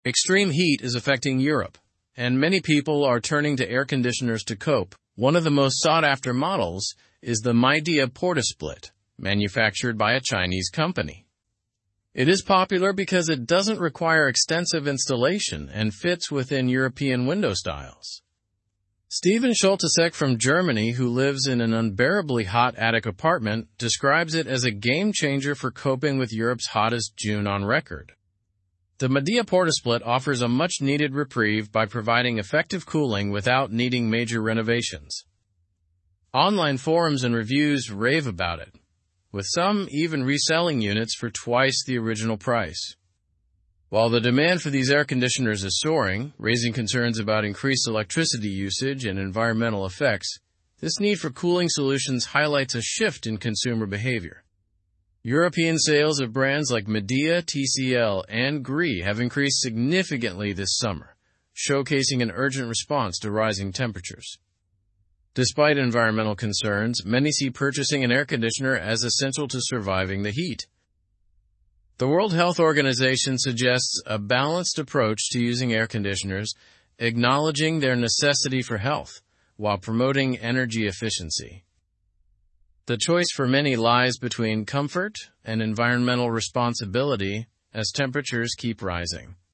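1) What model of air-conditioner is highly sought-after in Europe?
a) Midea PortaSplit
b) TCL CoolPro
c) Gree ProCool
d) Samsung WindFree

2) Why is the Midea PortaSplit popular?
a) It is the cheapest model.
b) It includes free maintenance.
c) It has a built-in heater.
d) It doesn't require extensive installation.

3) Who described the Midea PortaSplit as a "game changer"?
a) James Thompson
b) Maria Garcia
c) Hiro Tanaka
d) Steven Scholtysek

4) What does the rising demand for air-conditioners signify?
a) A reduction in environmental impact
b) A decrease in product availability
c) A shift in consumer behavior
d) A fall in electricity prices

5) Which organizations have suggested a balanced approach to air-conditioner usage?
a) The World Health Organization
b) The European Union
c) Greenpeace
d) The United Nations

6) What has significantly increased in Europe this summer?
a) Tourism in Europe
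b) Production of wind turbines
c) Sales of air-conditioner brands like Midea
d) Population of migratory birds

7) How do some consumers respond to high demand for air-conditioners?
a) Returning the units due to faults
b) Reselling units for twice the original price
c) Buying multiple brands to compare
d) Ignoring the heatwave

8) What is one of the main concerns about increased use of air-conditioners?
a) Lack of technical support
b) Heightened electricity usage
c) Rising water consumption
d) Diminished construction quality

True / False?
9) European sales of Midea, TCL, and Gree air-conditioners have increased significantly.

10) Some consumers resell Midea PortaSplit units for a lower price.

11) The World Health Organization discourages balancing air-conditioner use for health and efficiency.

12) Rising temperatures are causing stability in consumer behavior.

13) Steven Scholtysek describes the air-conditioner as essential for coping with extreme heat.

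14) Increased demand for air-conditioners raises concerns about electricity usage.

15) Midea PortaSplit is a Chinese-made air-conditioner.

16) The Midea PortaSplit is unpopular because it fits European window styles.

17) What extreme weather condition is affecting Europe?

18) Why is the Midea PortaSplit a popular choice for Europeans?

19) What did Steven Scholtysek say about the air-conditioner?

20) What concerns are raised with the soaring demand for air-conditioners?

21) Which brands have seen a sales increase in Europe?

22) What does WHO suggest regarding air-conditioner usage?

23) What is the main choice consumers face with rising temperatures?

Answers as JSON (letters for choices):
{"1": "a", "2": "d", "3": "d", "4": "c", "5": "a", "6": "c", "7": "b", "8": "b", "9": "True", "10": "False", "11": "False", "12": "False", "13": "True", "14": "True", "15": "True", "16": "False", "17": "Extreme heat is affecting Europe.", "18": "It doesn't require extensive installation and fits European window styles.", "19": "It is a game changer for coping with extreme heat.", "20": "Increased electricity usage and environmental effects.", "21": "Midea, TCL, and Gree have seen a sales increase.", "22": "A balanced approach, promoting energy efficiency while acknowledging their necessity.", "23": "A choice between comfort and environmental responsibility."}

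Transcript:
Extreme heat is affecting Europe, and many people are turning to air-conditioners to cope. One of the most sought-after models is the Midea PortaSplit, manufactured by a Chinese company. It is popular because it doesn't require extensive installation and fits within European window styles.
Steven Scholtysek from Germany, who lives in an unbearably hot attic apartment, describes it as a game changer for coping with Europe's hottest June on record. The Midea PortaSplit offers a much-needed reprieve by providing effective cooling without needing major renovations. Online forums and reviews rave about it, with some even reselling units for twice the original price.
While the demand for these air-conditioners is soaring, raising concerns about increased electricity usage and environmental effects, this need for cooling solutions highlights a shift in consumer behavior. European sales of brands like Midea, TCL, and Gree have increased significantly this summer, showcasing an urgent response to rising temperatures.
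Despite environmental concerns, many see purchasing an air-conditioner as essential to surviving the heat. The World Health Organization suggests a balanced approach to using air-conditioners, acknowledging their necessity for health while promoting energy efficiency. The choice for many lies between comfort and environmental responsibility as temperatures keep rising.

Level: Level 3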